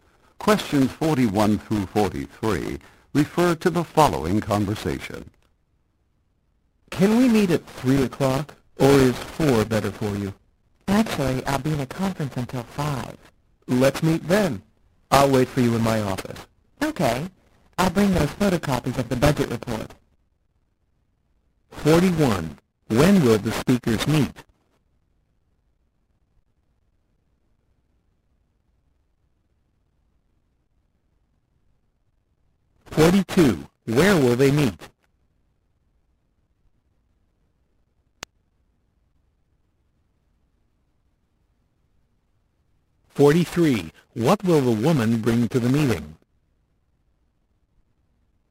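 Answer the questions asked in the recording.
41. At 5 o'clock
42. In the speaker's office
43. Photocopies of the budget report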